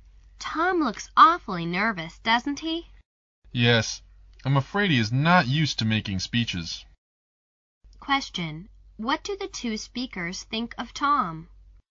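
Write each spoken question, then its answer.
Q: What do the two speakers think of Tom?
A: He is nervous because he is not used to making speeches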